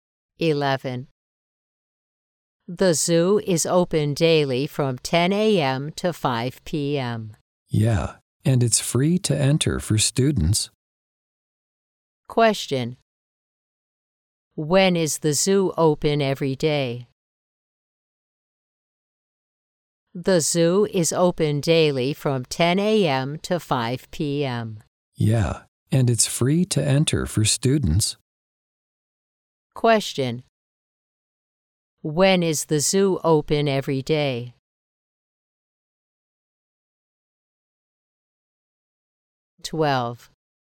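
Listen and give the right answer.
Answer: From 10 a.m. to 5 p.m.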